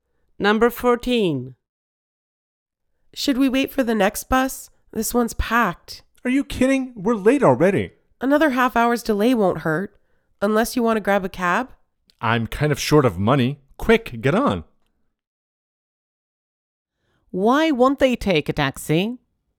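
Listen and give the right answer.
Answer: They are short of money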